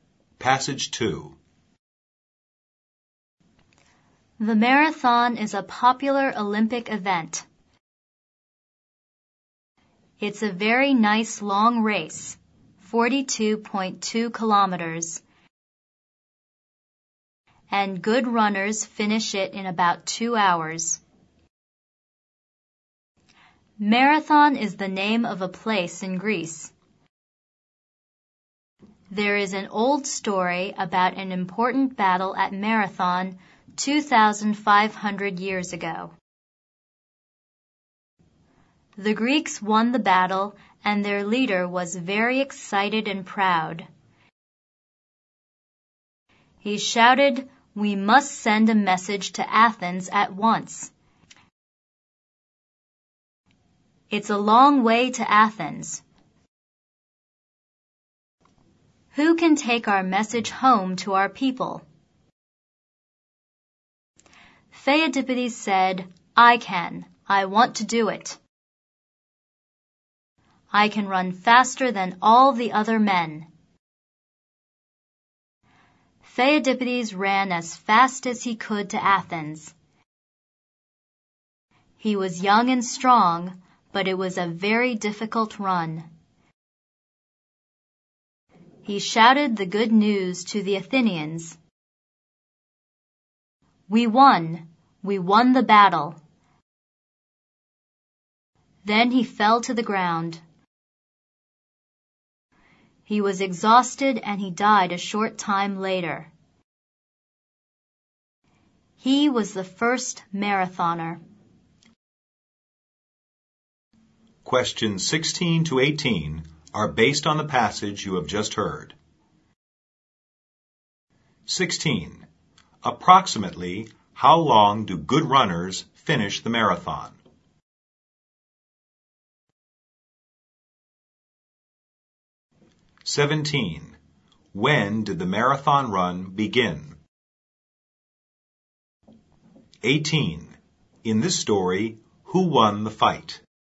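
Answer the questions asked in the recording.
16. About 2 hours
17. About 2,500 years ago
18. The Greeks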